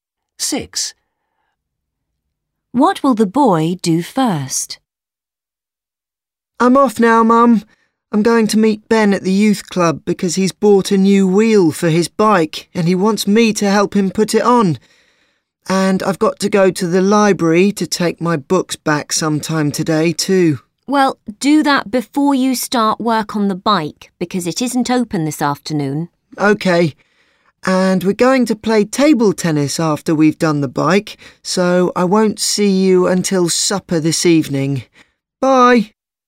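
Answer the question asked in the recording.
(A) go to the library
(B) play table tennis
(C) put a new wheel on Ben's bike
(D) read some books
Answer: (A) go to the library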